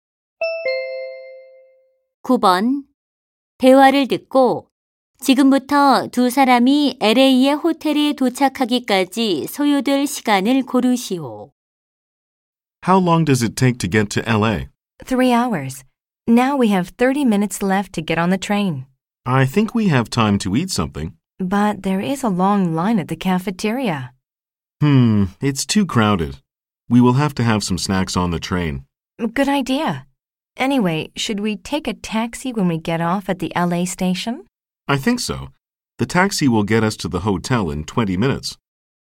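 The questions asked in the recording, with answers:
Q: 대화를 듣고 지금부터 두 사람이 LA의 호텔에 도착하기까지 소요될 시간을 고르시오.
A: 3시간 50분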